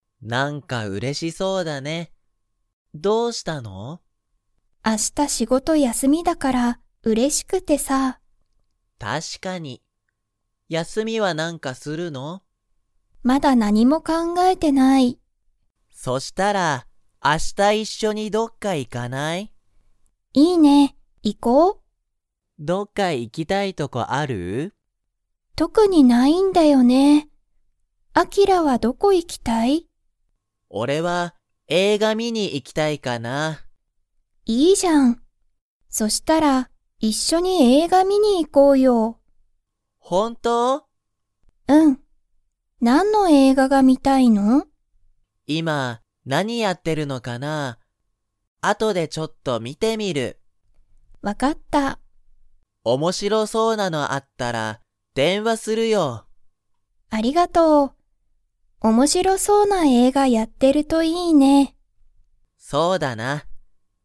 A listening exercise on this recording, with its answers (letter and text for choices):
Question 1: りほは、____仕事(しごと)が休(やす)みだ。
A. 今日(きょう)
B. 昨日きのう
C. 今(いま)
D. 明日あした)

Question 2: あきらとりほは、一緒(いっしょ)に映画(えいが)を観(み)に行(い)きますか?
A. はい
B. いいえ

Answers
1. D. 明日あした)
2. A. はい

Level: Level 2